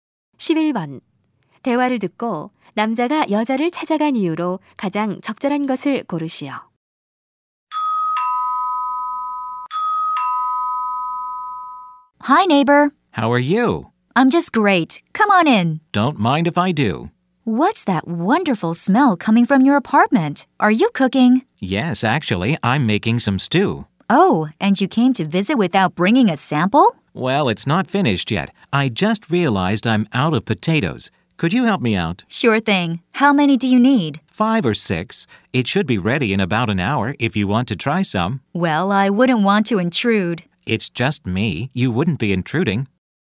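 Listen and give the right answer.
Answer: 감자를 빌리려고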